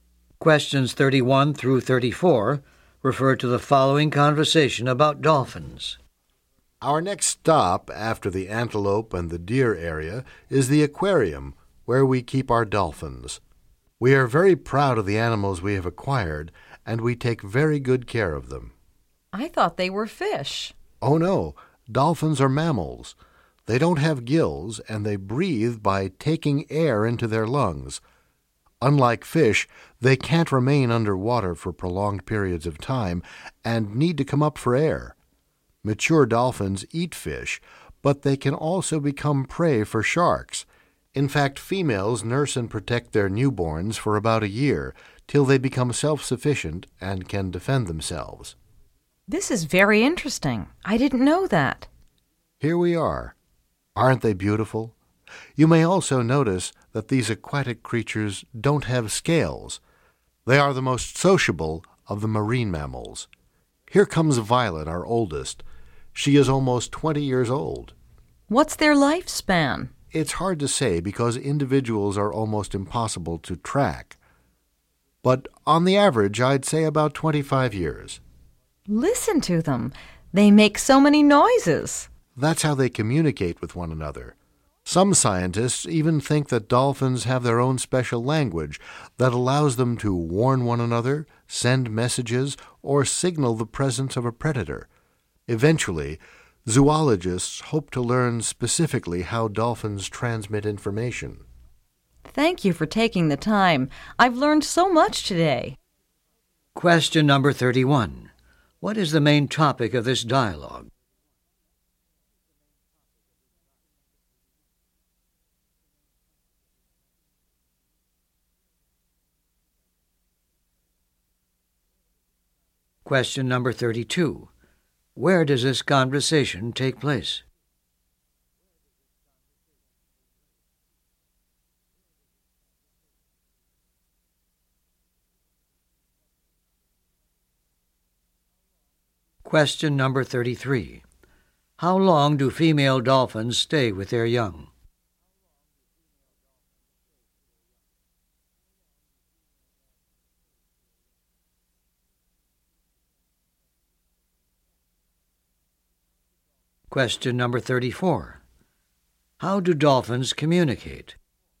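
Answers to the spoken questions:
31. Dolphins
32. At a zoo aquarium
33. About a year
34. By making noises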